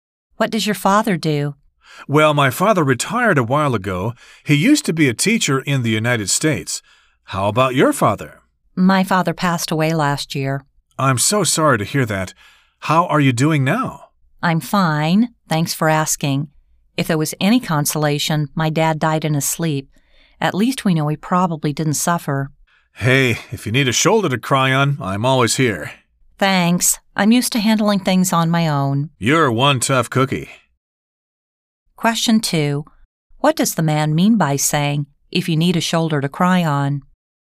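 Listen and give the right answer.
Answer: He is offering to comfort and support her if she feels sad.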